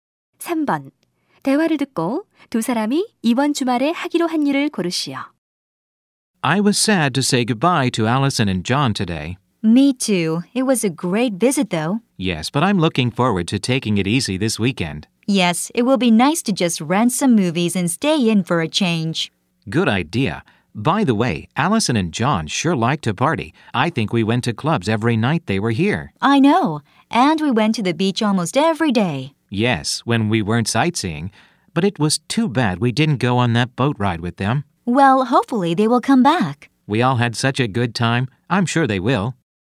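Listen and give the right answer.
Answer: 영화를 빌려 집에서 쉬기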